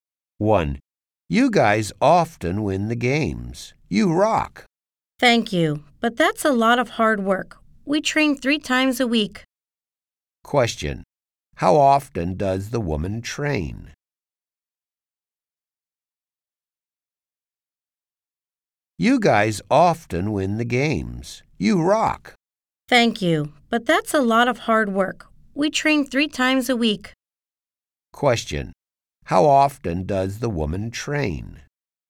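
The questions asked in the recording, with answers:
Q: How often does the woman train?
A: Three times a week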